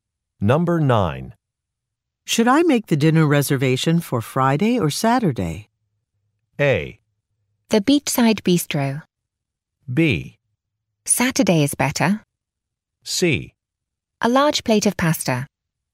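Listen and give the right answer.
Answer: B: Saturday is better.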